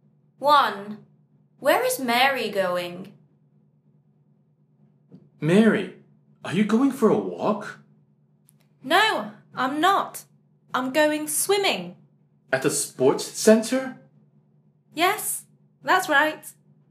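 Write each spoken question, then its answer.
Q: Where is Mary going?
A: swimming at the sports center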